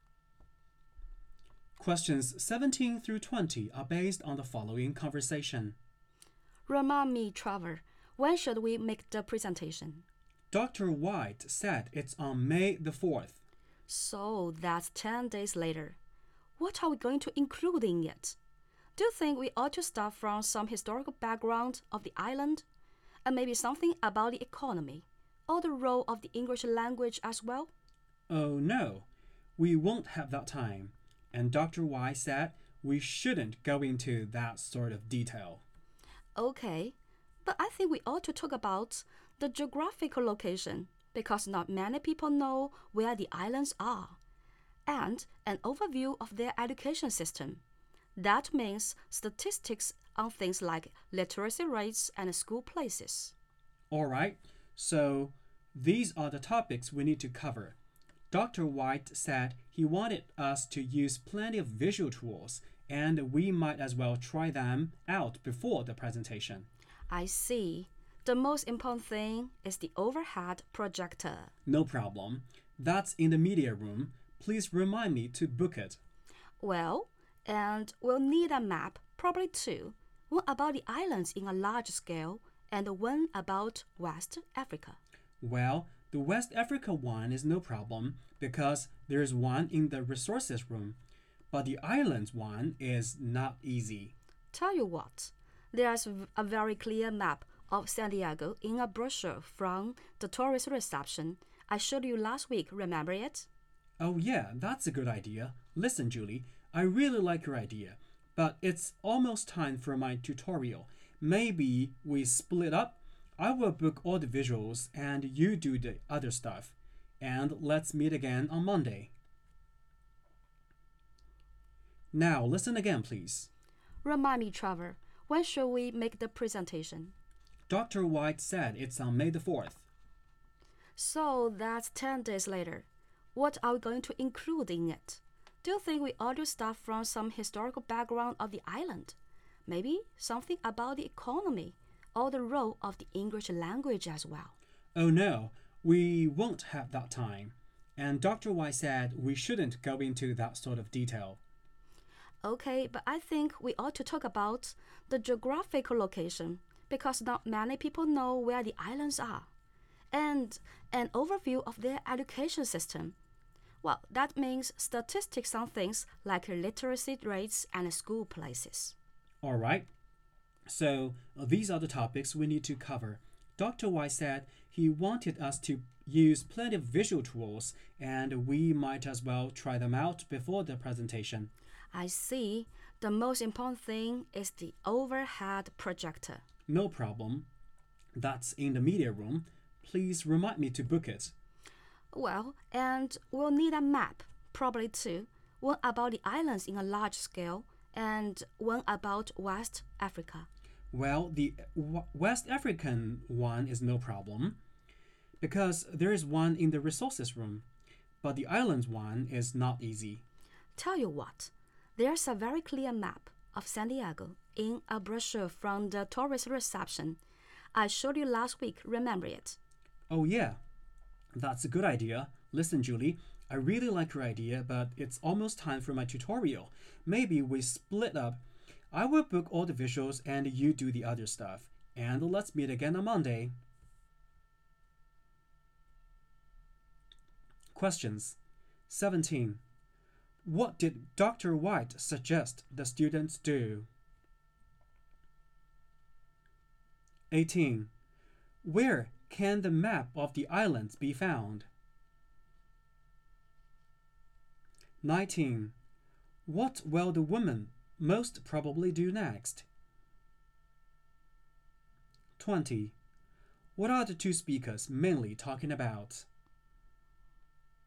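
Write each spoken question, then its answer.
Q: Where can the map of the islands be found?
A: In a brochure from the tourist reception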